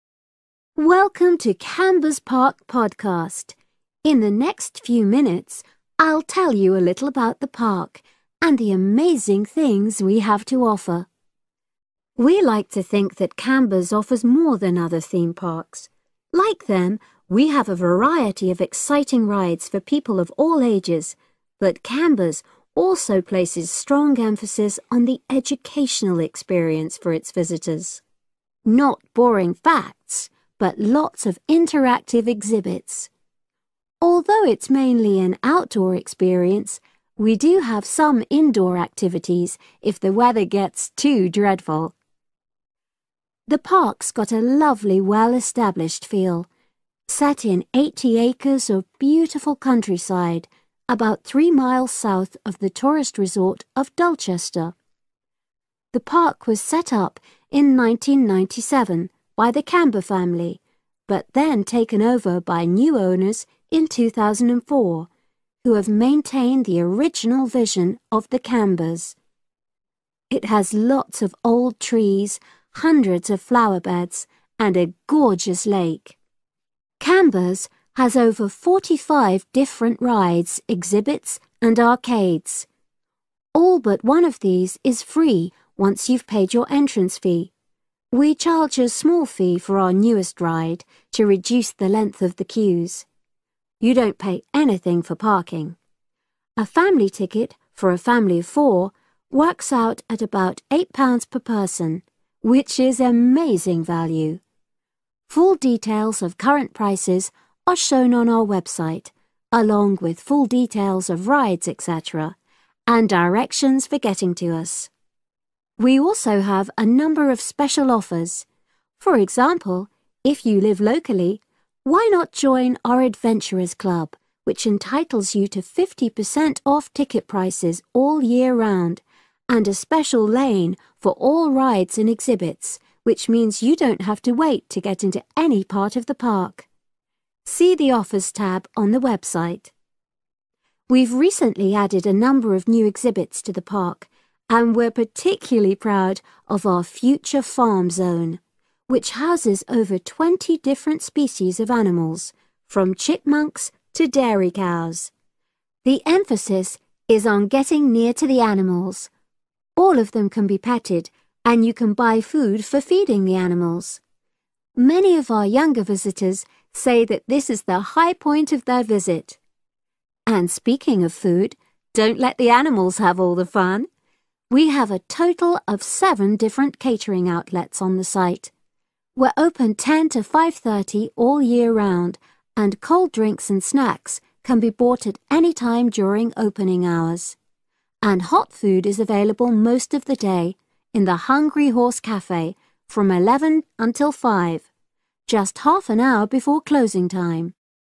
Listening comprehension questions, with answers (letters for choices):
Choose the correct answer, A, B or C.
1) According to the speaker, in what way is Camber's different from other theme parks?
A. It's suitable for different age groups.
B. It offers lots to do in wet weather.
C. It has a focus on education.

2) The Park first opened in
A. 1980.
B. 1997.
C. 2004.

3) What's included in the entrance fee?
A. most rides and parking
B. all rides and some exhibits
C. parking and all rides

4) Becoming a member of the Adventurers Club mean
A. you can avoiding queuing so much.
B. you can enter the Park free for a year.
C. you can visit certain zones closed to other people.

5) The Future Farm zone encourages visitors to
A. buy animals as pets.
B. learn about the care of animals.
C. get close to the animals.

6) When is hot food available in the park?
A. 10.00 a.m. - 5.30 p.m.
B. 11.00 a.m. - 5.00 p.m.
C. 10.30 a.m. - 5.00 p.m.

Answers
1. C
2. B
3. A
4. A
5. C
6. B

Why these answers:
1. Người nói nói rằng giống các công viên khác, Camber's có nhiều trò chơi cho mọi lứa tuổi, nhưng điểm khác biệt là Camber's nhấn mạnh vào trải nghiệm giáo dục cho khách tham quan.
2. "First opened" tương ứng với "was set up". Công viên được thành lập năm 1997 bởi gia đình Camber.
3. Sau khi trả phí vào cửa, hầu hết các trò chơi/hoạt động đều miễn phí, chỉ có một trò mới nhất phải trả thêm phí nhỏ. Bãi đỗ xe cũng miễn phí.
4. Thành viên Adventurers' Club có làn riêng cho các trò chơi và khu trưng bày, nghĩa là không phải chờ lâu để vào các khu trong công viên.
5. Future Farm Zone nhấn mạnh việc khách tham quan được đến gần động vật, có thể vuốt ve và mua thức ăn cho chúng.
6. Công viên mở cửa từ 10:00 đến 5:30, nhưng đồ ăn nóng chỉ có ở Hungry Horse cafe từ 11:00 đến 5:00.

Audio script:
In the next few minutes, I'll tell you a little about the park and the amazing things we have to offer.
We like to think that Camber's offers more than other theme parks. Like them, we have a variety of exciting rides for people of all ages, but Camber's also places strong emphasis on the educational experience for its visitors ... not boring facts but lots of interactive exhibits. Although it's mainly an outdoor experience, we do have some indoor activities if the weather gets too dreadful.Primary & Secondary Schooling (K-12)
The park's got a lovely well established feel, set in eighty acres of beautiful countryside about three miles south of the tourist resort of Dulchester. The park was set up in nineteen ninety seven by the Camber family but then taken over by new owners in two thousand and four, who have maintained the original vision of the Cambers. It has lots of old trees, hundreds of flower beds and a gorgeous lake.
Camber's has over forty- five different rides, exhibits and arcades. All but one of these is free once you have paid your entrance fee (we charge a small fee for our newest ride, to reduce the length of the queues). You don't pay anything for parking. A family ticket – for a family of four – works out at about eight pounds per person, which is amazing value. Full details of current prices are shown on our website, along with full details of rides, etc., and directions for getting to us.
We also have a number of special offers. For example, if you live locally, why not join our Adventurers' Club, which entitles you fifty percent off ticket prices all year round, and a special 'lane' for all rides and exhibits which means you don't have to wait to get into any part of the park. See the Offers tab on the website.
We've recently added a number of new exhibits to the park, and we're particularly proud of our Future Farm Zone, which houses over twenty different species of animals, from chipmunks to dairy cows. The emphasis is on getting near to the animals – all of them can be petted and you can buy food for feeding the animals. Many of our younger visitors say that this is the high point of their visit!
And speaking of food, don't let the animals have all the fun. We have a total of seven different catering outlets on the site. We're open ten to five thirty all year round and cold drinks and snacks can be bought at any time during opening hours. And hot food is available most of the day in the Hungry Horse cafe – from eleven until five – just half an hour before closing time.
Presenter: Now we want all our visitors to have an exciting time when they come to the park but our first priority must be safety.